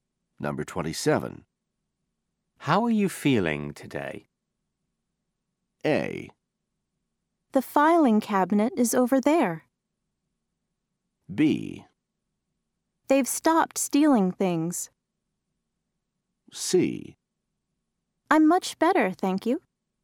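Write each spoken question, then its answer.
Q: How are you feeling today?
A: C: I'm much better, thank you.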